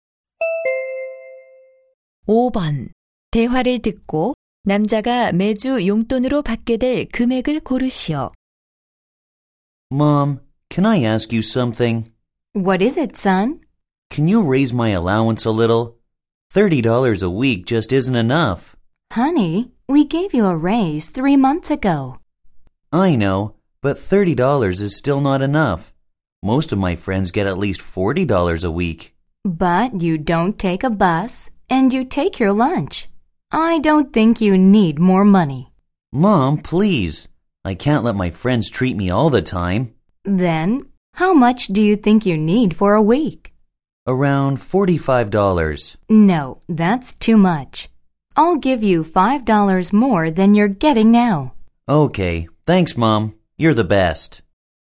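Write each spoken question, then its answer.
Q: 대화를 듣고 남자가 매주 용돈으로 받게 될 금액을 고르시오.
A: 35달러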